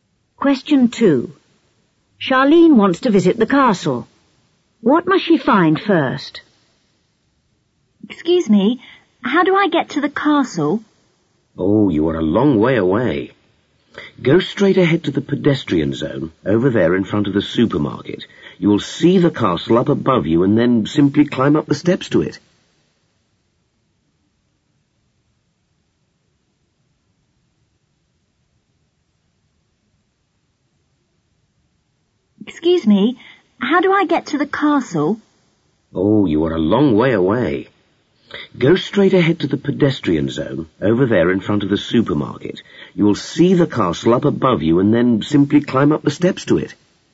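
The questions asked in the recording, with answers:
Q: What must she find first?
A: The pedestrian zone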